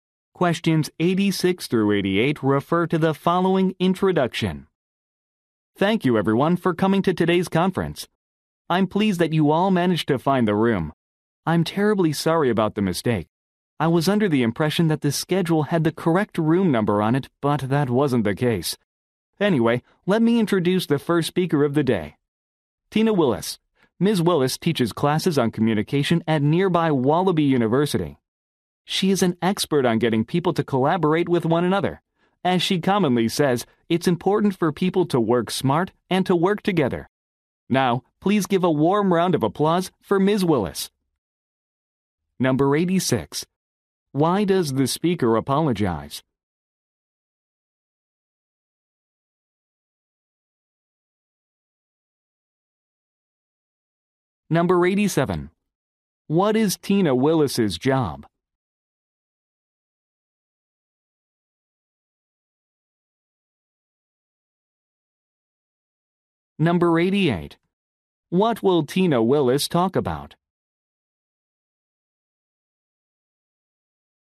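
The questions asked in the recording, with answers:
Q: Why does the speaker apologize?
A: The schedule had the wrong room number

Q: What is Tina Willis's job?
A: A university communication teacher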